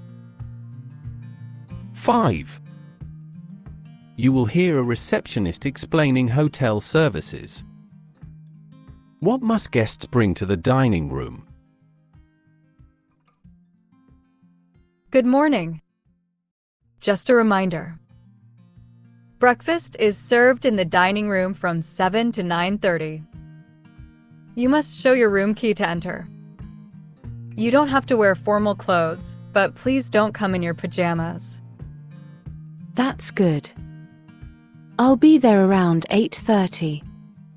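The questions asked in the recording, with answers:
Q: What must guests bring to the dining room?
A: Their room key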